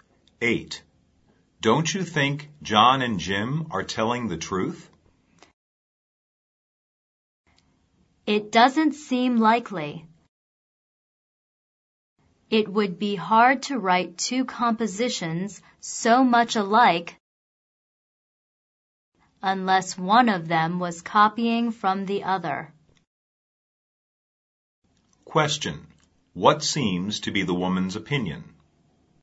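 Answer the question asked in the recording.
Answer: One of them copied from the other; they are not telling the truth.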